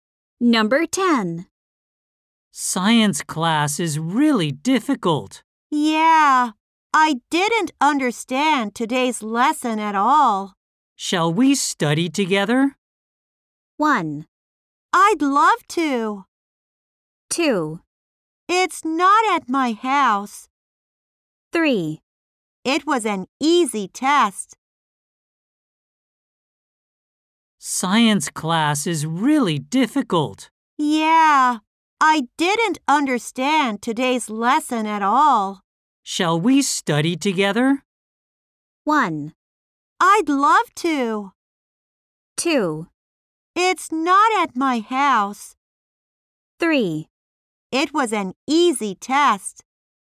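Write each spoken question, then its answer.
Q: Shall we study together?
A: 1: I'd love to.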